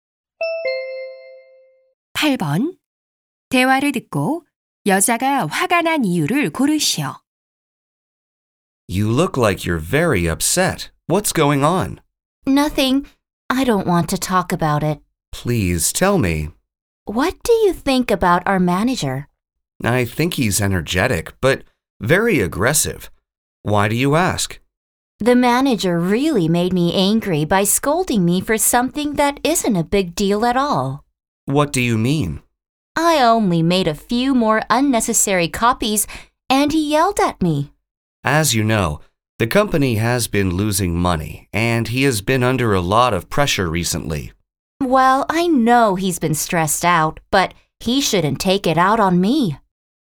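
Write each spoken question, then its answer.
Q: 대화를 듣고 여자가 화가 난 이유를 고르시오.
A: 사소한 일(불필요한 복사)로 매니저에게 꾸중을 들어서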